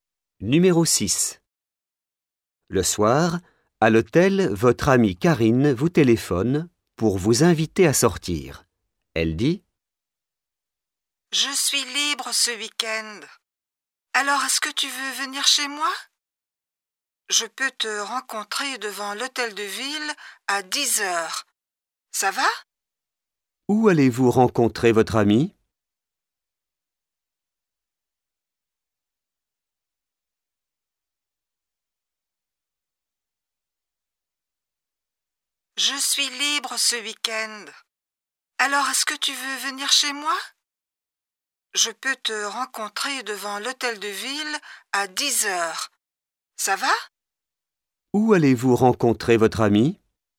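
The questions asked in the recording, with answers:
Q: Où allez-vous rencontrer votre ami?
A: Devant l'hôtel de ville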